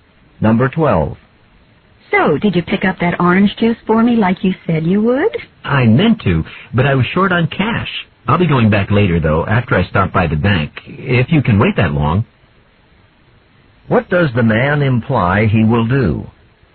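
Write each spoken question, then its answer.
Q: What does the man imply he will do?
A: Buy the orange juice later, after going to the bank.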